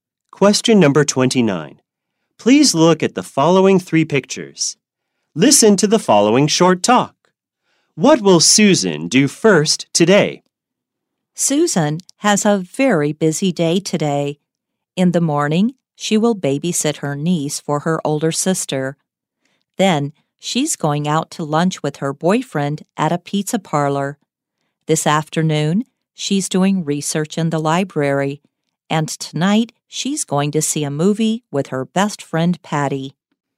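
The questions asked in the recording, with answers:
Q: What will Susan do first today?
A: Babysit her niece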